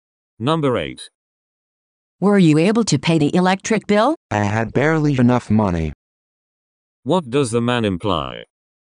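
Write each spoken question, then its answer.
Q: What does the man imply?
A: He just managed to pay the bill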